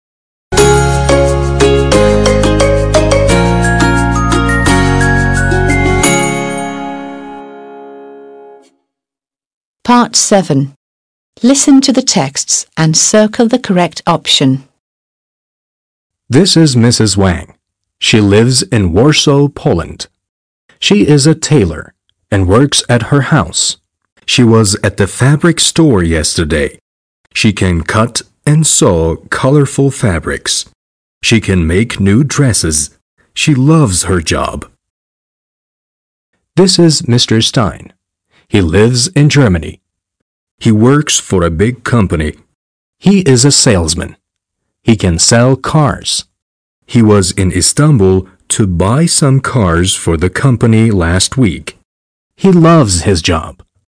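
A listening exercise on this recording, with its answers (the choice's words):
7. Listen to the texts and circle the correct option.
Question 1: She is a (1) tailor/hairdresser and works at her house.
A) tailor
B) hairdresser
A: tailor

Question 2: She can (2) cut/sell and (3) sew/build colorful fabrics.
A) cut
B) sell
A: cut

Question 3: She can (2) cut/sell and (3) sew/build colorful fabrics.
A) sew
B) build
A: sew

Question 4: She (4) loves/hates her job.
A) loves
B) hates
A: loves

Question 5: He is a (5) salesman/mechanic.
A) salesman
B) mechanic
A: salesman

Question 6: He can (6) sell/fix cars.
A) sell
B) fix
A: sell

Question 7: He was in İstanbul to (7) buy/sell some cars for the company last week.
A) buy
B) sell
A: buy

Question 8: He (8) doesn't like/loves his job.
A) doesn't like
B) loves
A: loves

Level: 6. Sınıf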